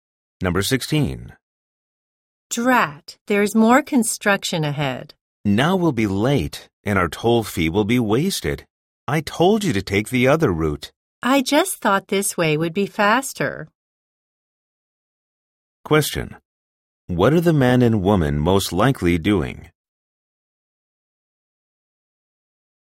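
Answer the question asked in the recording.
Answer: Driving on a toll road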